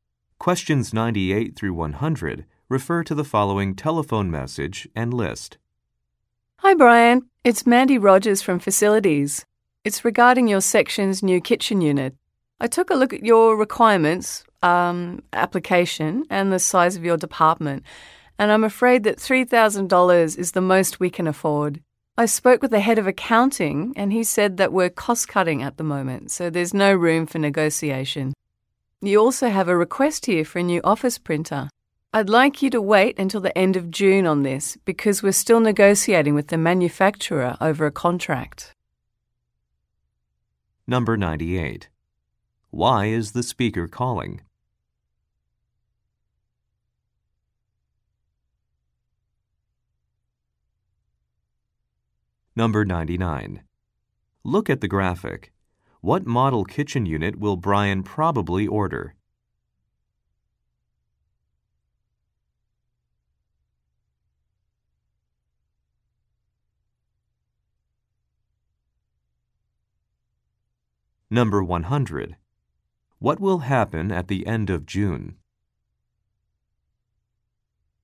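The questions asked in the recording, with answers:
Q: Why is the speaker calling?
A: To discuss the budget for a new kitchen unit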